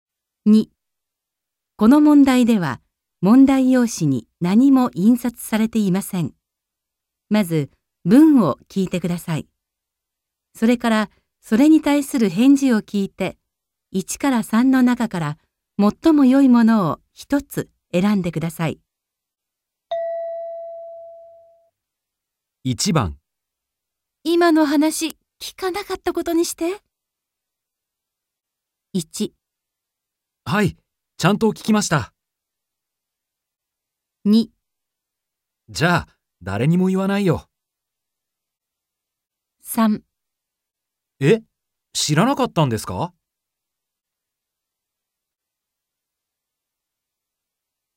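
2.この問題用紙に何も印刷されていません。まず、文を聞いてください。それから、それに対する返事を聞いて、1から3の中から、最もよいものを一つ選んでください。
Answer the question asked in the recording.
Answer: じゃ、誰にも言わないよ。

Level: N2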